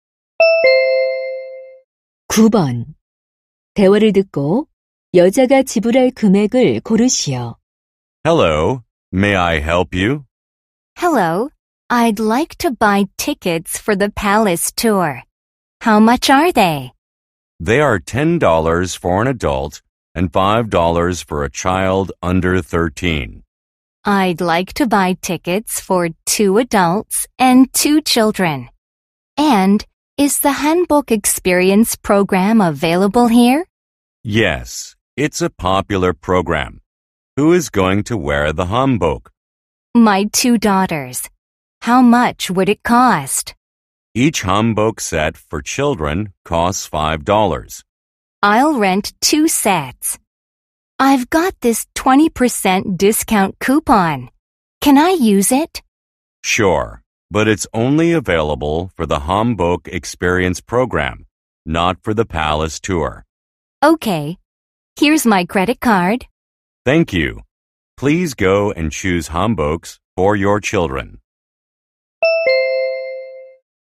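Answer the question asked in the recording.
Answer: $38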